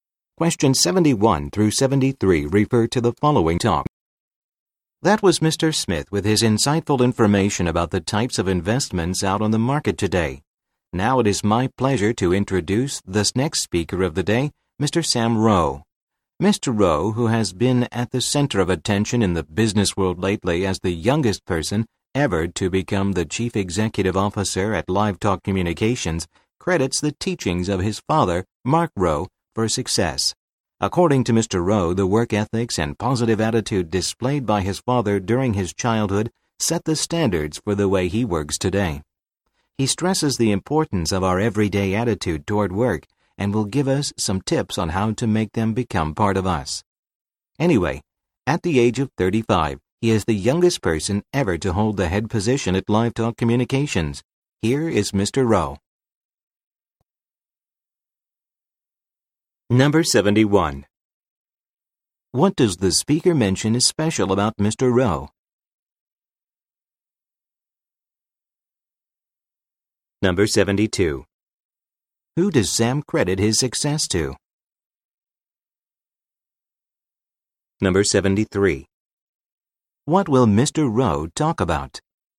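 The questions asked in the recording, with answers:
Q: Who does Sam credit his success to?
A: His father, Mark Rowe

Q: What will Mr. Rowe talk about?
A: The importance of everyday attitude toward work, with tips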